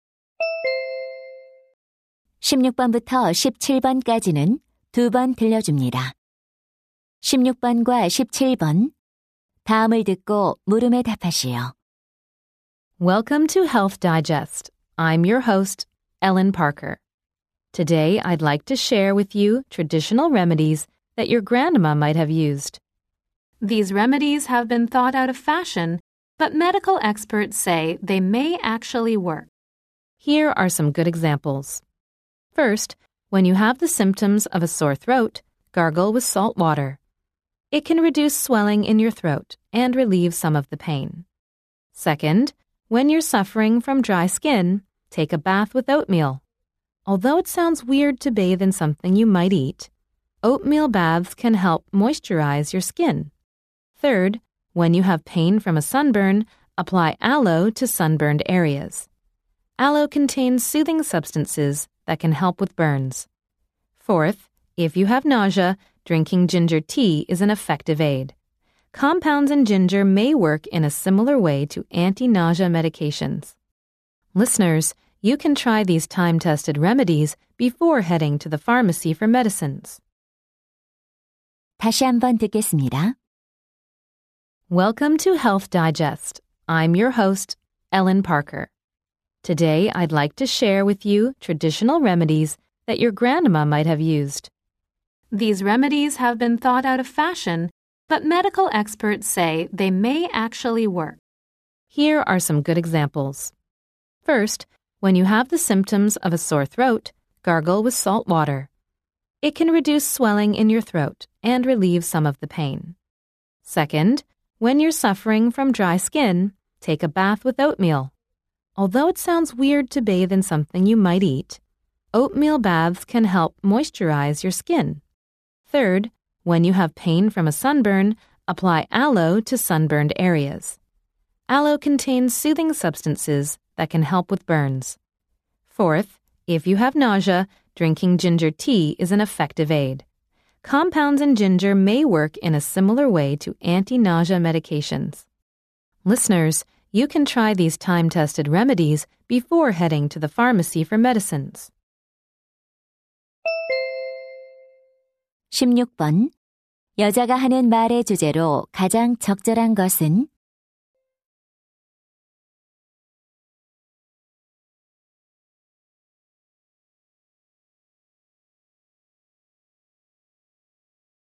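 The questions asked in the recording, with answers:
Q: 여자가 하는 말의 주제로 가장 적절한 것은?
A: 증상 완화에 효과적인 전통 민간요법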